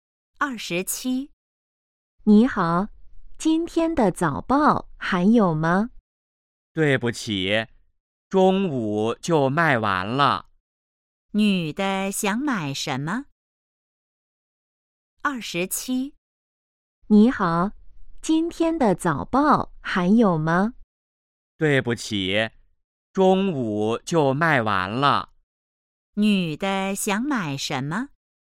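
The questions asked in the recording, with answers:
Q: 女的想买什么?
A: 今天的早报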